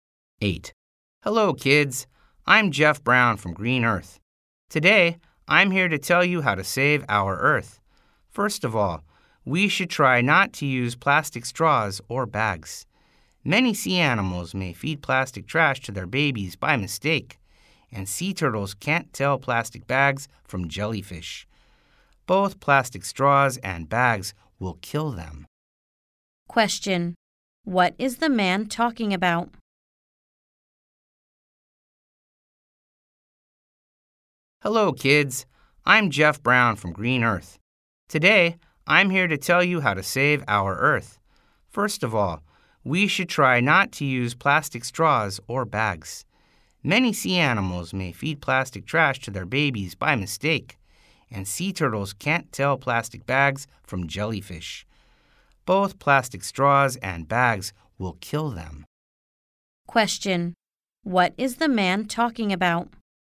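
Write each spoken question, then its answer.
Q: What is the man talking about?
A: How to save the Earth by not using plastic straws or bags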